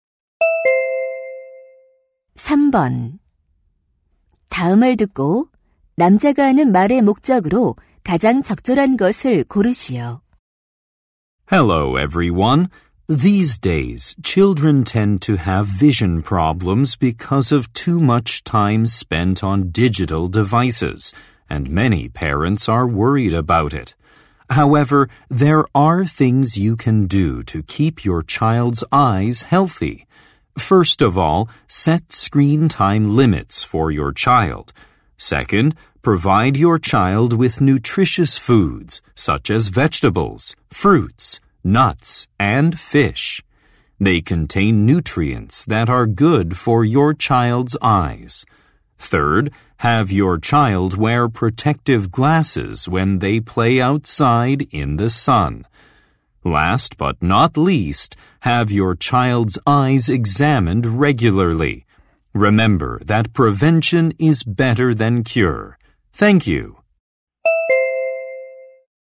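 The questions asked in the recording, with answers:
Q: 다음을 듣고 남자가 하는 말의 목적으로 가장 적절한 것을 고르시오.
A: 자녀의 눈 건강을 지키는 방법을 알려 주려고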